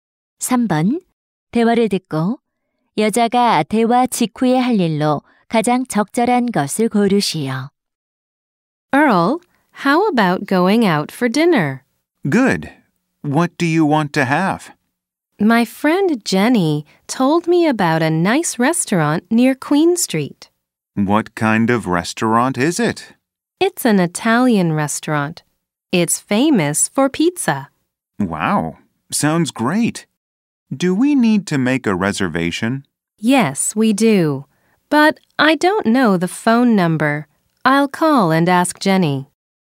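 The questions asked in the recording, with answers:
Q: 대화를 듣고 여자가 대화 직후에 할 일로 가장 적절한 것을 고르시오.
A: Jenny에게 전화하기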